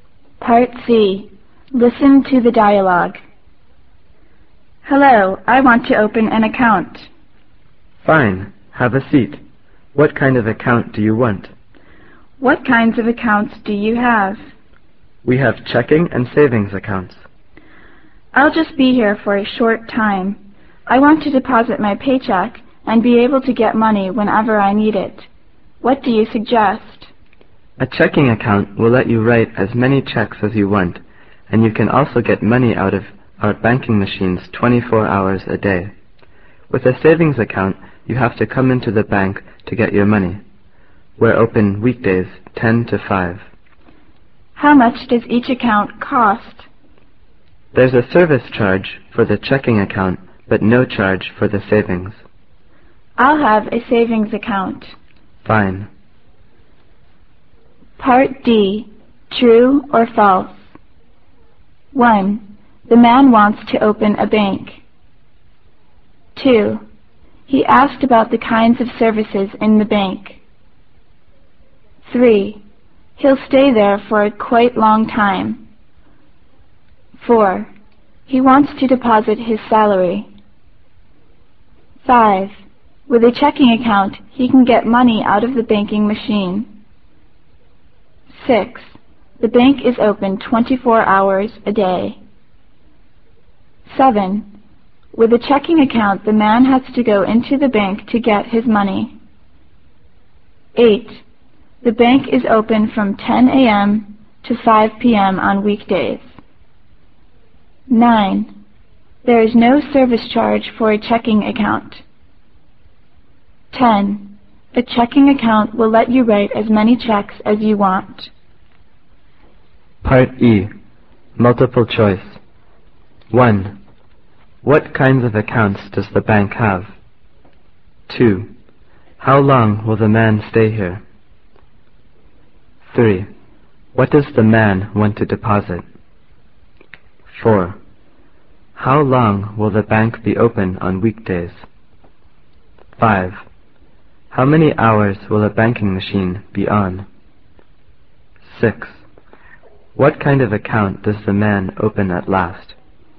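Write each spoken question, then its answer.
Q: The man wants to open a bank.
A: False

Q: He'll stay there for a quite long time.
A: False

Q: He wants to deposit his salary.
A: True

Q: With a checking account, he can get money out of the banking machine.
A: True

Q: The bank is open 24 hours a day.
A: False

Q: With a checking account, the man has to go into the bank to get his money.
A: False

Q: The bank is open from 10 a.m. to 5 p.m. on weekdays.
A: True

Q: There is no service charge for a checking account.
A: False

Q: A checking account will let you write as many checks as you want.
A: True

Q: What kinds of accounts does the bank have?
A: Checking and savings accounts

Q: How long will the man stay here?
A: A short time

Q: What does the man want to deposit?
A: His paycheck

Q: How long will the bank be open on weekdays?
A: From 10 to 5

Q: How many hours will a banking machine be on?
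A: 24 hours a day

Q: What kind of account does the man open at last?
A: A savings account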